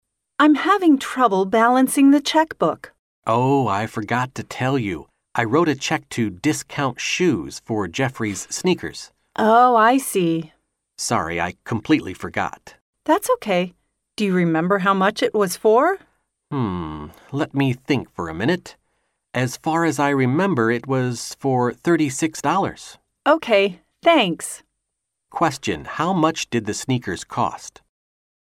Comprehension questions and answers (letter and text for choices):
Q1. How much did the sneakers cost?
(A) Thirty-six dollars.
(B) Thirty-six pounds.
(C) Twenty-six dollars.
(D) Twenty-six pounds.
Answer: (A) Thirty-six dollars.

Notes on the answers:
女士说自己支票账单核算不对,男士回答忘记告诉她自己买了一双鞋。女士问鞋价多少,男士回答36美元。故正确答案为A。